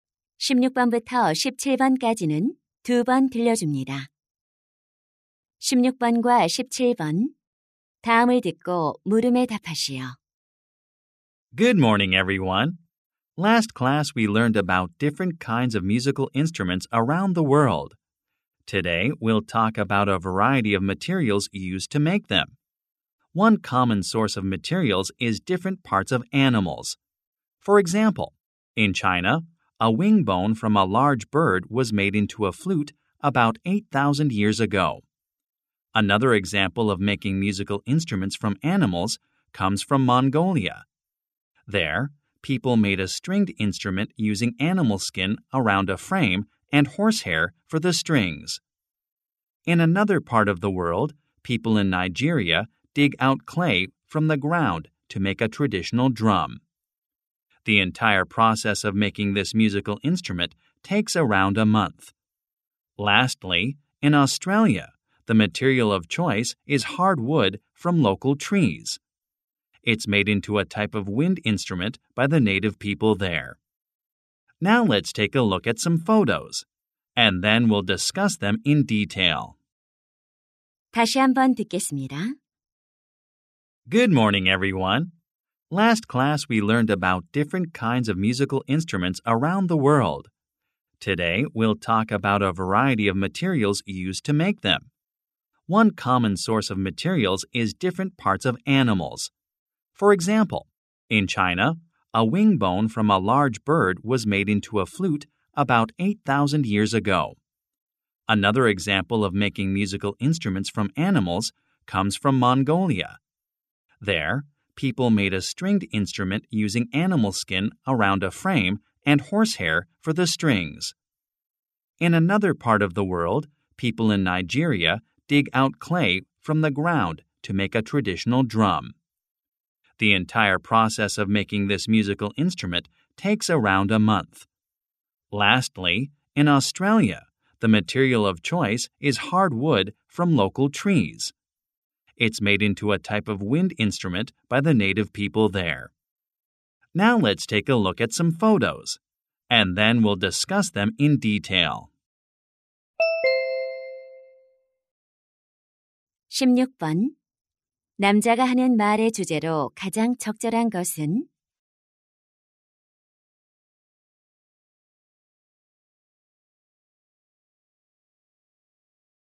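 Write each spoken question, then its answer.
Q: 남자가 하는 말의 주제로 가장 적절한 것은?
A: 세계 각지의 악기를 만드는 데 사용된 다양한 재료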